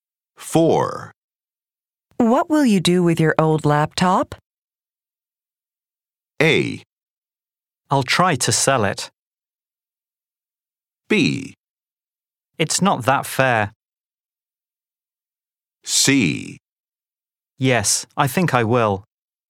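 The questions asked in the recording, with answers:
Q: What will you do with your old laptop?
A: A: I'll try to sell it.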